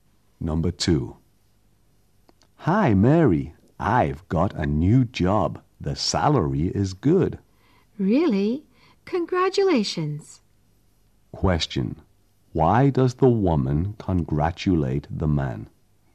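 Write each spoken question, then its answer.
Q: Why does the woman congratulate the man?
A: He got a new job with a good salary.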